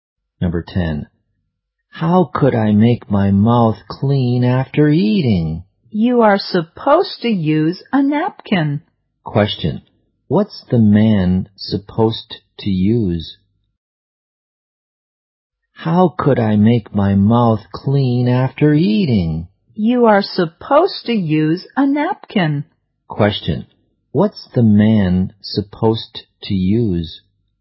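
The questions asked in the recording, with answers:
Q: Question. What's the man supposed to use?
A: A napkin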